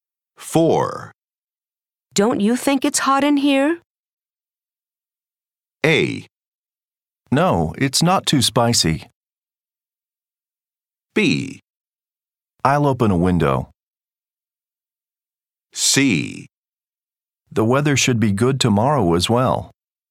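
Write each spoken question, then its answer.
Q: Don't you think it's hot in here?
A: B: I'll open a window.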